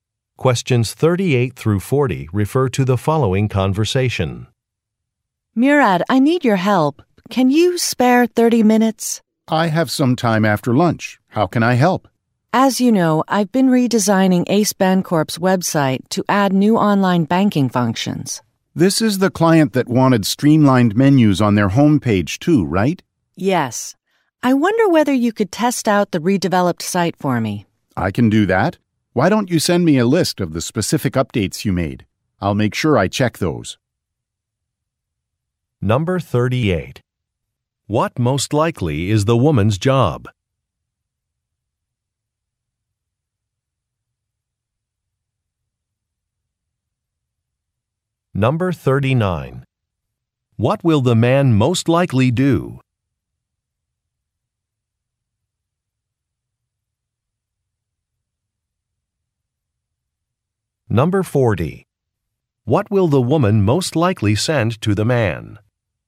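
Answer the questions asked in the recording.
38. Website designer
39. Test the redeveloped website
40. A list of the updates she made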